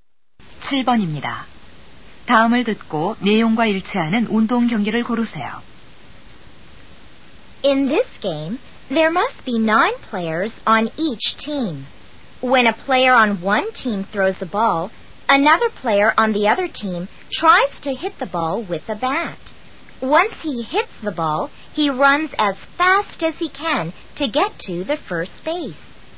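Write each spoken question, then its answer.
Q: 다음을 듣고 내용과 일치하는 운동 경기를 고르세요.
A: 야구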